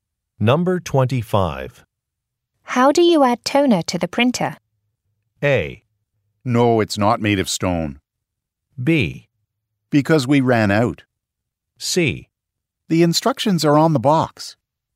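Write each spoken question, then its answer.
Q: How do you add toner to the printer?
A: C: The instructions are on the box.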